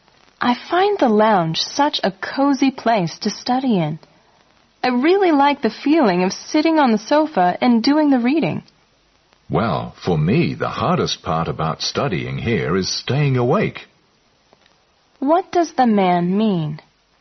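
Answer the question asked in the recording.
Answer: The lounge is so comfortable that it's hard to stay awake while studying there.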